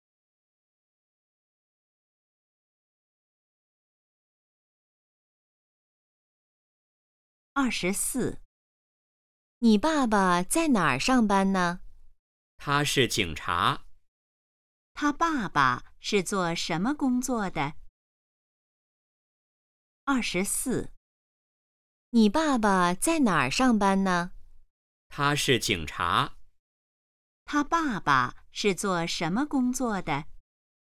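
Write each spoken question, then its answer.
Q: 他爸爸是做什么工作的?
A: 警察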